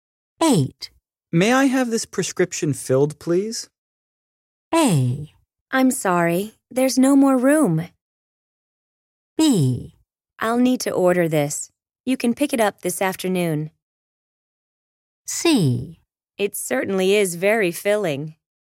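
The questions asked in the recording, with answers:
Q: May I have this prescription filled, please?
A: B: I'll need to order this. You can pick it up this afternoon.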